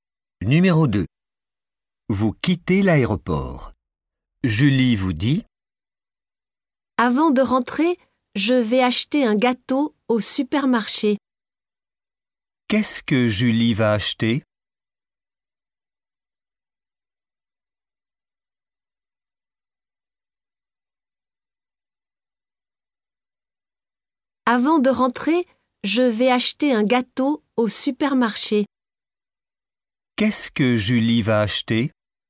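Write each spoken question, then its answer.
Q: Qu'est-ce que Julie va acheter ?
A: Un gâteau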